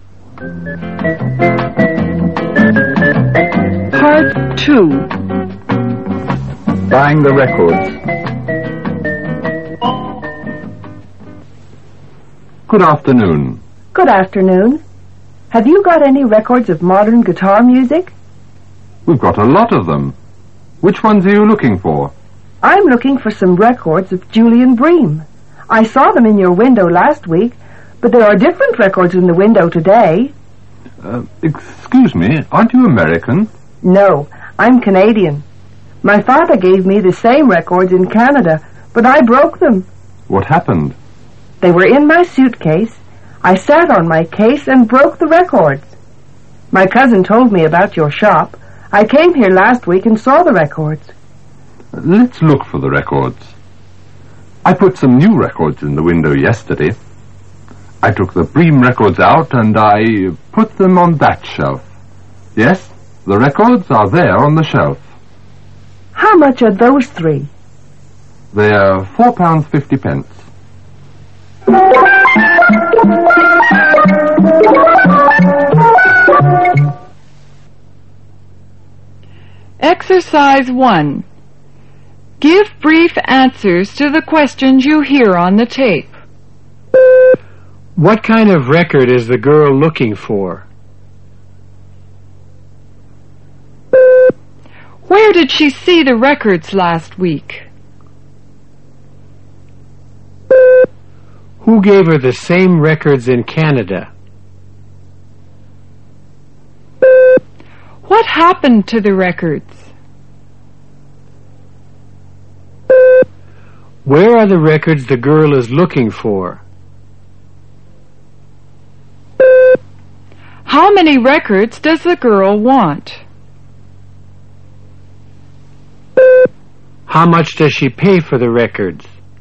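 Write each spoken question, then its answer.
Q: What kind of record is the girl looking for?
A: Modern guitar music by Julian Bream

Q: Where did she see the records last week?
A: In the shop window

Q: Who gave her the same records in Canada?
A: Her father

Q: What happened to the records?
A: She sat on her suitcase and broke them

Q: Where are the records the girl is looking for?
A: On the shelf

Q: How many records does the girl want?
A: Three

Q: How much does she pay for the records?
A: £4.50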